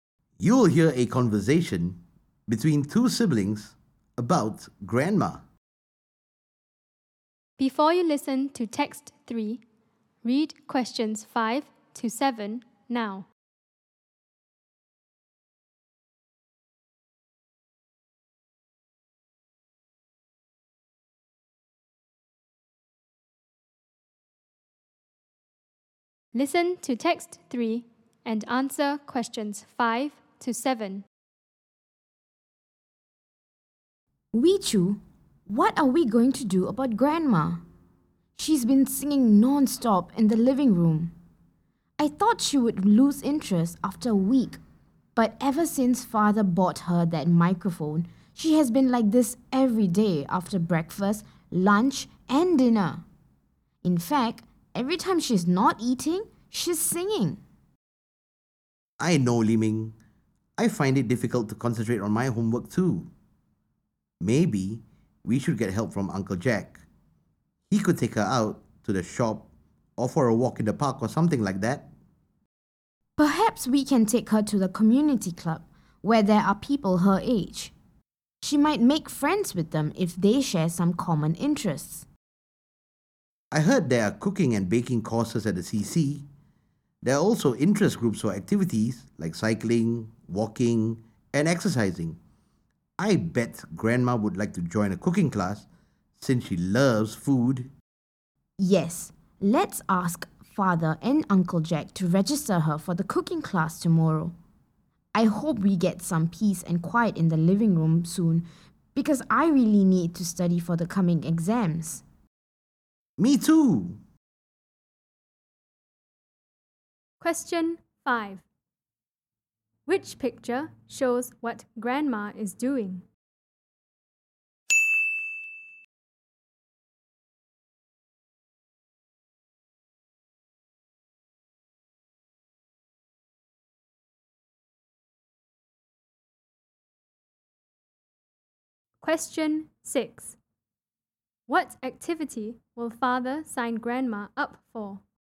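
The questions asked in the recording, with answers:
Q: What activity will Father sign Grandma up for?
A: A cooking class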